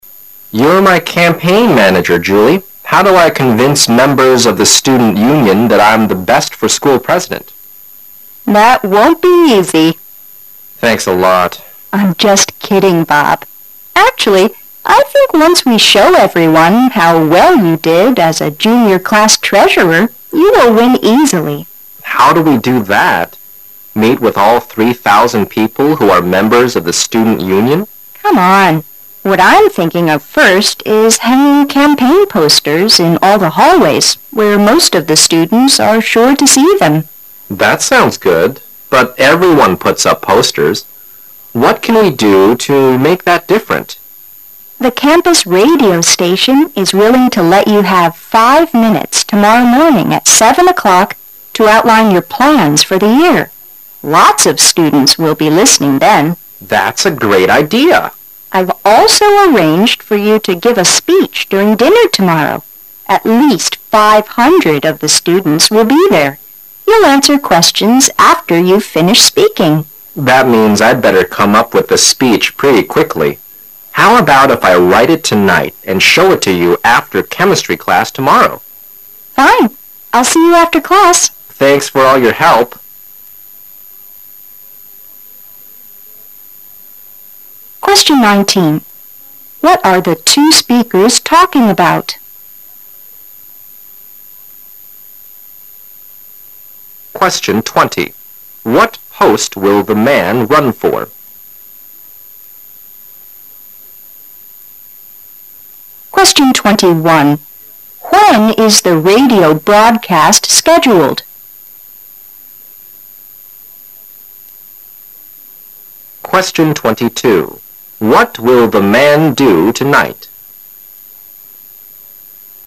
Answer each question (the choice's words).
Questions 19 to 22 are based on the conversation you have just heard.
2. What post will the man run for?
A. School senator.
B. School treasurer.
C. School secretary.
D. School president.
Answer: School president.

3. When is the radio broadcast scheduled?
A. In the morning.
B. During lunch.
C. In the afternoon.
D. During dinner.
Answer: In the morning.

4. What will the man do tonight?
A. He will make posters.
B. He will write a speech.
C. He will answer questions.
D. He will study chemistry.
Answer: He will write a speech.

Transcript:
[解析] 19-22 M: You're my campaign manager, Julie. How do I convince members of the Student Union that I'm the best for school president? W: That won't be easy. M: Thanks a lot. W: I'm just kidding, Bob. Actually I think once we show everyone how well you did as a junior class treasurer, you will win easily. M: How do we do that? Meet with all three thousand people who are members of the Student Union? W: Come on. What I'm thinking of first is hanging campaign posters in all the hallways, where most of the students are sure to see them. M: That sounds good. But everyone puts up posters. What can we do make that different? W: The campus radio station is willing to let you have five minutes tomorrow morning at seven o'clock to outline your plans for the year. Lots of students will be listening, then. M: That's a great idea! W: I've also arranged for you to give a speech during dinner tomorrow. You'll answer questions after you've finished speaking. M: That means I'd better come up with the speech pretty quickly. How 'about if I write it tonight and show it to you after chemistry class tomorrow? W: Fine. I'll see you after class. M: Thanks for all your help! 19. What are the two speakers talking about?